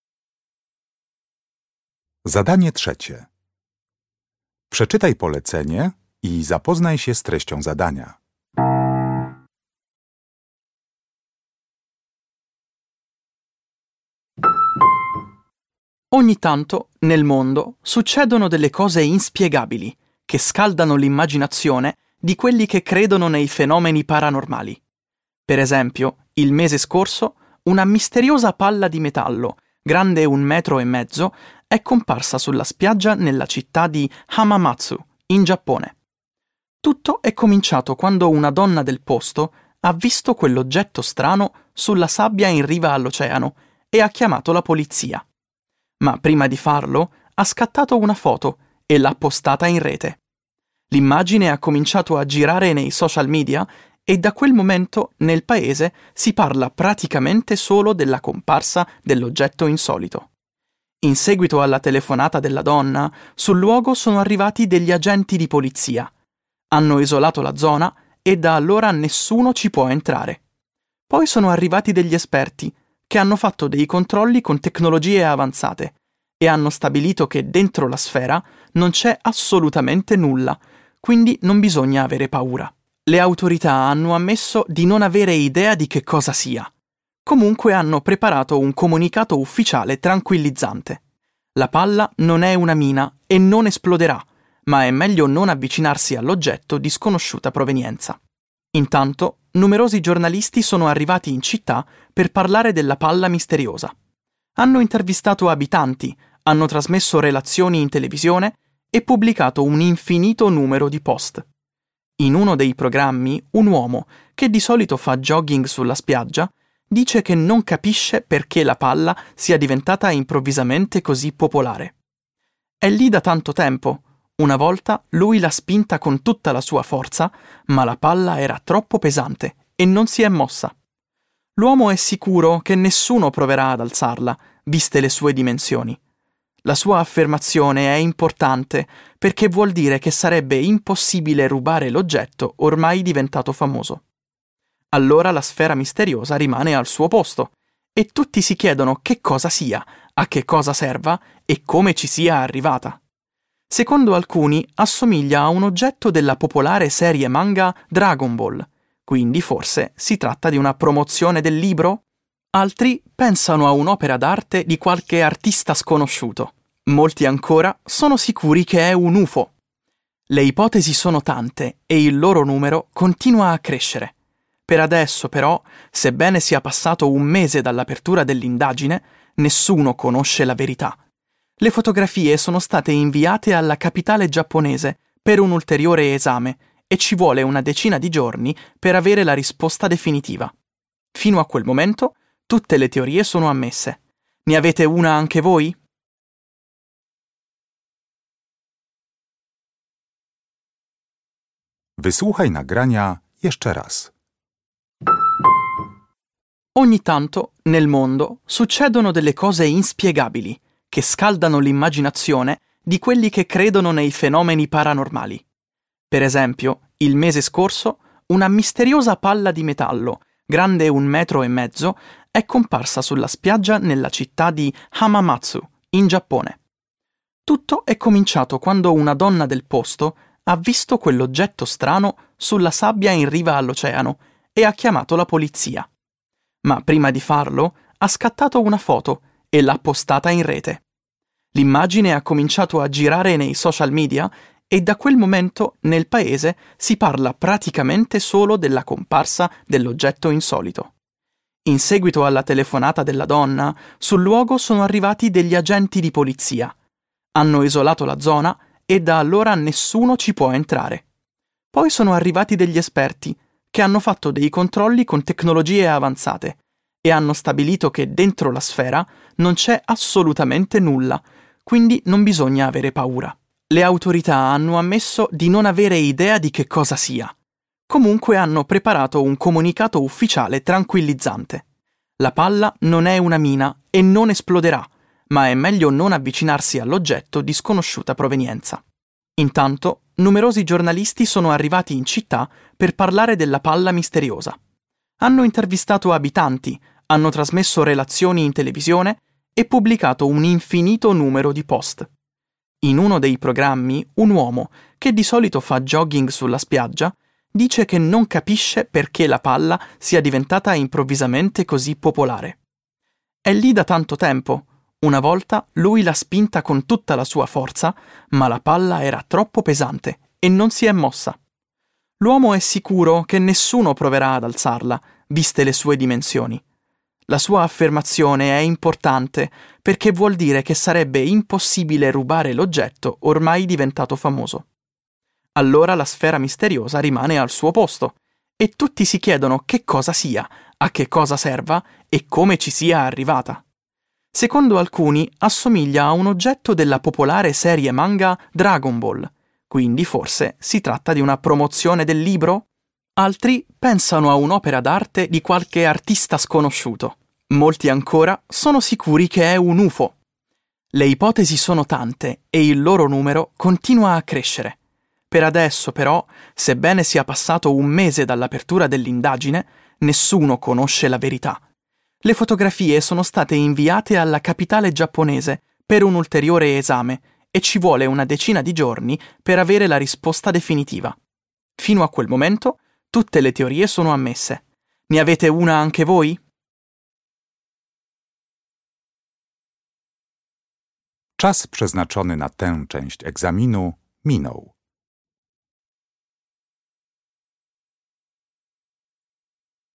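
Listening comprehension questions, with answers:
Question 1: Una donna giapponese, quando ha visto la sfera misteriosa in spiaggia, per prima cosa .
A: ha scattato una foto

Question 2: Gli esperti hanno scoperto che l'oggetto non è pericoloso perché dentro .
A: non c'è nulla

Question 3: Un uomo, che di solito corre in spiaggia, ha provato anche a la sfera, ma senza risultato.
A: spingere

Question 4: Bisogna aspettare ancora circa per sapere di che cosa si tratti.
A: dieci giorni

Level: Poziom: rozszerzony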